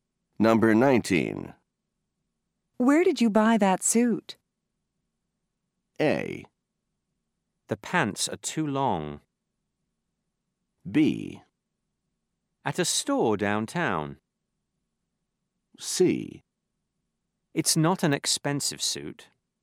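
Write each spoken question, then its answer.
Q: Where did you buy that suit?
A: B: At a store downtown.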